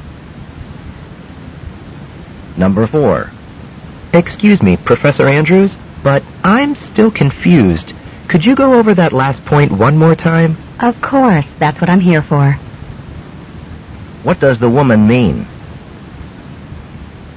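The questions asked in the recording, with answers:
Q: What does the woman mean?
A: She is happy to explain the point again.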